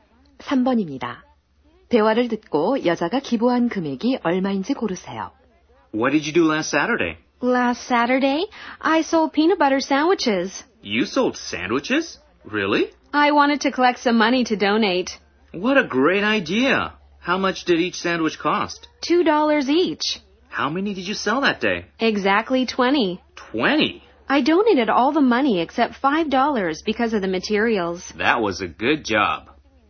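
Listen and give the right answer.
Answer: 35달러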